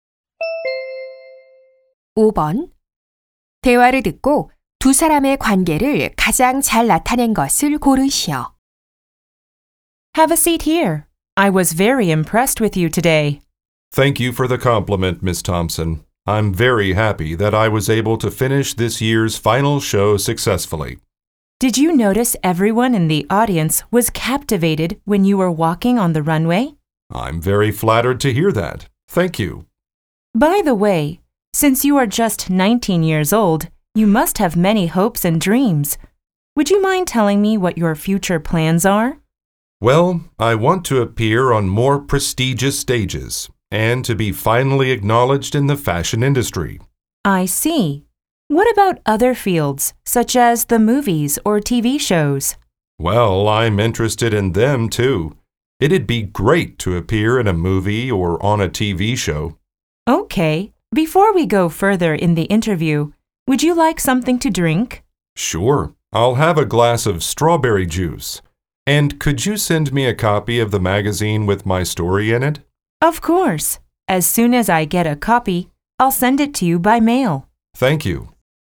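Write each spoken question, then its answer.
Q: 대화를 듣고 두 사람의 관계를 가장 잘 나타낸 것을 고르시오.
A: 잡지 기자 - 패션모델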